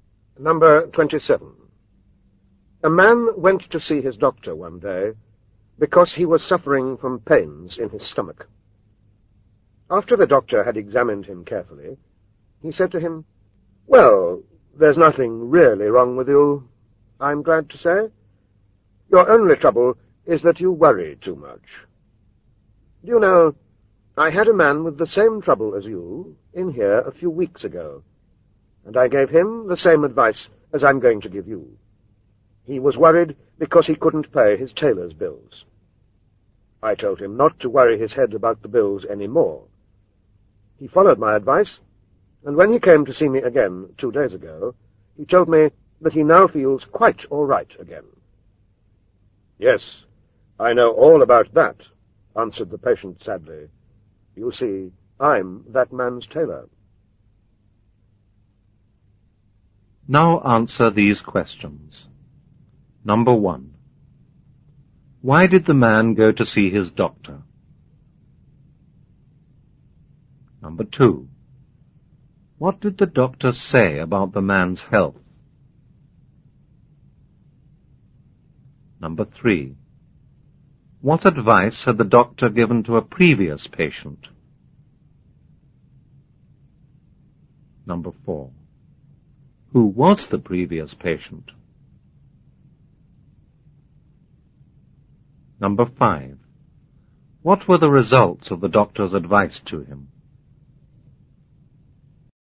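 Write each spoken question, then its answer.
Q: Why did the man go to see his doctor?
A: Because he had pains in his stomach

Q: What did the doctor say about the man's health?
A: There was nothing really wrong with him; he only worried too much

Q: What advice had the doctor given to a previous patient?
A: Not to worry about his tailor's bills any more

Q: Who was the previous patient?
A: A man who couldn't pay his tailor's bills; the patient was his tailor

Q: What were the results of the doctor's advice to him?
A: He felt quite all right again, but he still didn't pay his tailor, who now worried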